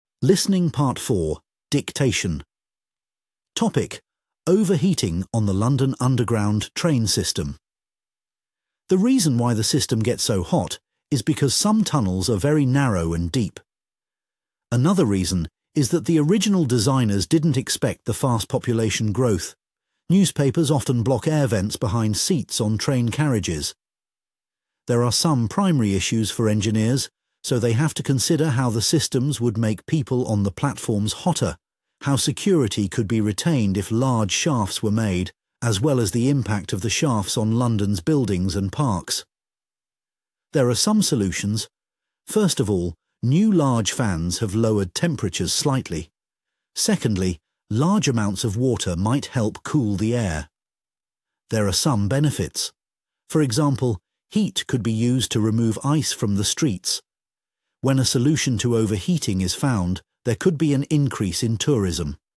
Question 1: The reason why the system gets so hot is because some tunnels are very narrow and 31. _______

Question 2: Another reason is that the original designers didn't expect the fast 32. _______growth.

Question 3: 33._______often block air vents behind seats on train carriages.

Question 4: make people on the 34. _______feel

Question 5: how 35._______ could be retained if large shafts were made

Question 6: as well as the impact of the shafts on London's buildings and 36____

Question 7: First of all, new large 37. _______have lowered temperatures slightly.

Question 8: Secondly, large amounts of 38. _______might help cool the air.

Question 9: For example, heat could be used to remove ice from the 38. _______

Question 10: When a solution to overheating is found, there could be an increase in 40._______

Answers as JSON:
{"1": "deep", "2": "population", "3": "newspapers", "4": "platforms", "5": "security", "6": "parks", "7": "fans", "8": "water", "9": "streets", "10": "tourism"}